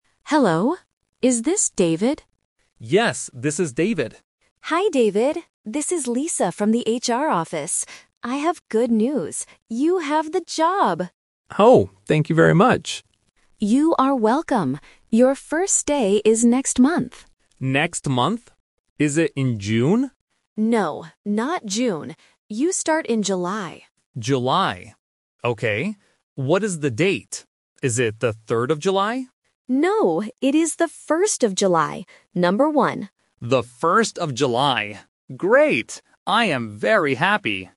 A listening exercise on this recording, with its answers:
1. What is the good news for David?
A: He has the job.

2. What month does David start his new job?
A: July

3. What is the date of his first day?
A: The 1st

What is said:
Lisa: Hello. Is this David?
David: Yes, this is David.
Lisa: Hi David, this is Lisa from the HR office. I have good news. You have the job!
David: Oh, thank you very much!
Lisa: You are welcome. Your first day is next month.
David: Next month. Is it in June?
Lisa: No, not June. You start in July.
David: July. Okay. What is the date? Is it the 3rd of July?
Lisa: No, it is the 1st of July. Number one.